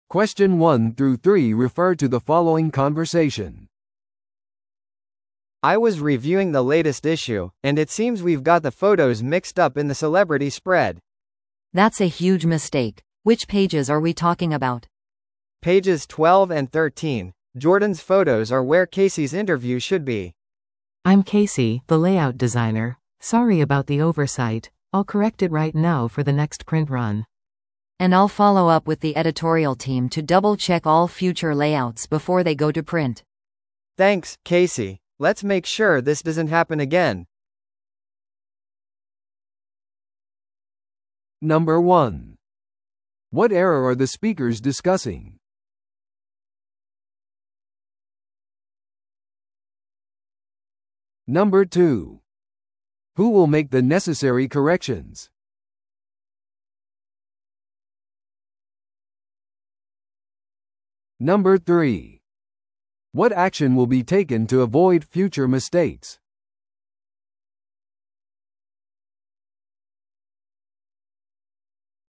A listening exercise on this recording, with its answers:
Listen to the audio below and answer the questions.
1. What error are the speakers discussing?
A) 情報が間違っている記事。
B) 印刷スケジュールの混同。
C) 財務報告の間違い。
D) 雑誌の写真が間違った場所に配置されている。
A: 雑誌の写真が間違った場所に配置されている。

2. Who will make the necessary corrections?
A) 最初に話した男性。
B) ケーシー。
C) ジョーダン。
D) 編集チーム。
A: ケーシー。

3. What action will be taken to avoid future mistakes?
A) 話者は雑誌のページ数を減らします。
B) ケーシーはレイアウトチームから退く。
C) 編集チームが今後のレイアウトをすべてダブルチェックする。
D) ジョーダンがセレブのインタビューを見直す。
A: 編集チームが今後のレイアウトをすべてダブルチェックする。

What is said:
A: I was reviewing the latest issue, and it seems we've got the photos mixed up in the celebrity spread.
B: That's a huge mistake. Which pages are we talking about?
A: Pages 12 and 13. Jordan's photos are where Casey's interview should be.
C: I'm Casey, the layout designer. Sorry about the oversight. I'll correct it right now for the next print run.
B: And I'll follow up with the editorial team to double-check all future layouts before they go to print.
A: Thanks, Casey. Let's make sure this doesn't happen again.

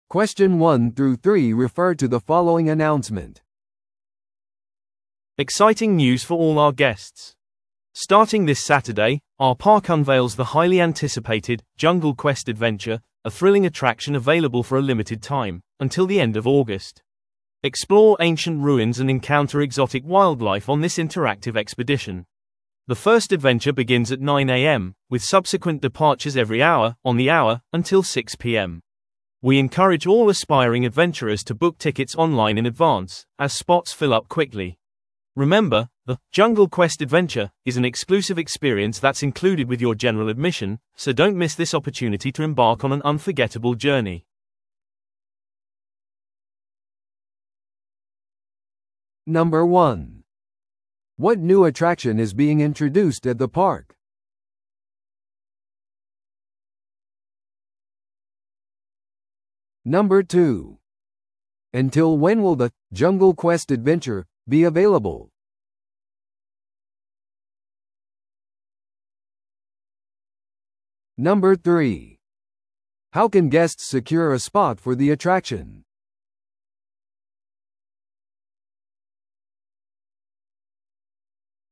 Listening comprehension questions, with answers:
Listen to the audio below and answer the questions.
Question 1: What new attraction is being introduced at the park?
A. スペーストレックギャラクシー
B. アンダーウォーターマーメイドキングダム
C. ジャングルクエストアドベンチャー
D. 恐竜サファリトレイル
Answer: ジャングルクエストアドベンチャー

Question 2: Until when will the 'Jungle Quest Adventure' be available?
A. 6月末まで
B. 7月末まで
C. 8月末まで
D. 9月末まで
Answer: 8月末まで

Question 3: How can guests secure a spot for the attraction?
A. 公園内で早く並んで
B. プレミアムパスを購入して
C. 公園のオフィスに電話して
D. 事前にオンラインでチケットを予約して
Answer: 事前にオンラインでチケットを予約して

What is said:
Exciting news for all our guests! Starting this Saturday, our park unveils the highly anticipated 'Jungle Quest Adventure', a thrilling attraction available for a limited time, until the end of August. Explore ancient ruins and encounter exotic wildlife on this interactive expedition. The first adventure begins at 9am, with subsequent departures every hour, on the hour, until 6pm. We encourage all aspiring adventurers to book tickets online in advance, as spots fill up quickly. Remember, the 'Jungle Quest Adventure' is an exclusive experience that's included with your general admission, so don't miss this opportunity to embark on an unforgettable journey!

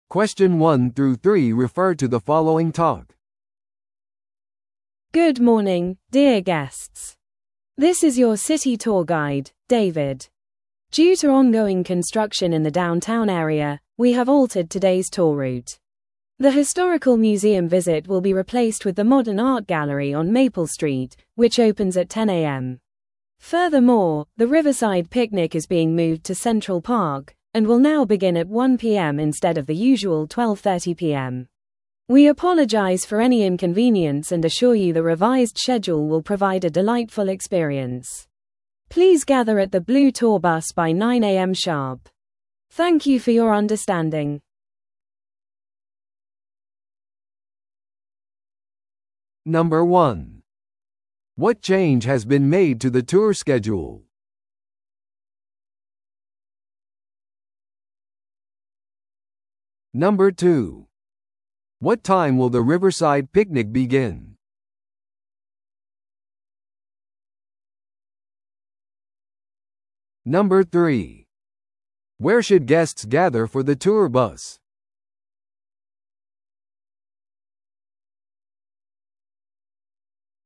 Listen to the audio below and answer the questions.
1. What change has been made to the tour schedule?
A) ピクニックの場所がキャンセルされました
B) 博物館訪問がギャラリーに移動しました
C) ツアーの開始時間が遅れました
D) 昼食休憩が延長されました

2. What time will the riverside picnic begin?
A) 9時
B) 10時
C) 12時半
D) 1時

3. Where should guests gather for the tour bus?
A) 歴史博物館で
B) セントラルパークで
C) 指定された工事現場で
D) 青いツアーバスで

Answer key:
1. 博物館訪問がギャラリーに移動しました
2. 1時
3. 青いツアーバスで

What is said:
Good morning, dear guests. This is your city tour guide, David. Due to ongoing construction in the downtown area, we have altered today's tour route. The historical museum visit will be replaced with the modern art gallery on Maple Street, which opens at 10am. Furthermore, the riverside picnic is being moved to Central Park, and will now begin at 1pm instead of the usual 12:30pm. We apologize for any inconvenience and assure you the revised schedule will provide a delightful experience. Please gather at the blue tour bus by 9am sharp. Thank you for your understanding.

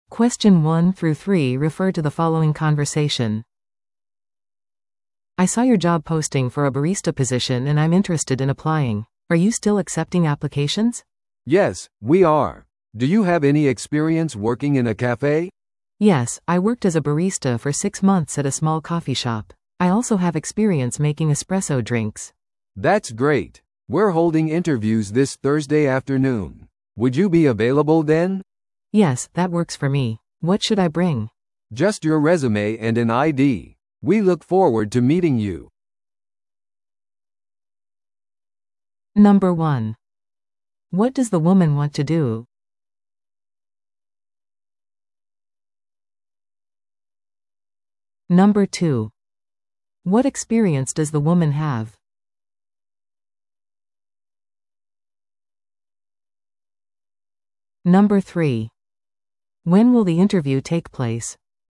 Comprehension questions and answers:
Listen to the audio below and answer the questions.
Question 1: What experience does the woman have?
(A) ベーカリーで働いていた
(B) レジ係として働いていた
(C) 6か月間バリスタとして働いていた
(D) 経験がない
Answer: 6か月間バリスタとして働いていた

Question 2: When will the interview take place?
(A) 月曜の朝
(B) 木曜の午後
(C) 土曜の夜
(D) 金曜の夜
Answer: 木曜の午後

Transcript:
A: "I saw your job posting for a barista position and I'm interested in applying. Are you still accepting applications?"
B: "Yes, we are. Do you have any experience working in a café?"
A: "Yes, I worked as a barista for six months at a small coffee shop. I also have experience making espresso drinks."
B: "That's great. We're holding interviews this Thursday afternoon. Would you be available then?"
A: "Yes, that works for me. What should I bring?"
B: "Just your resume and an ID. We look forward to meeting you."

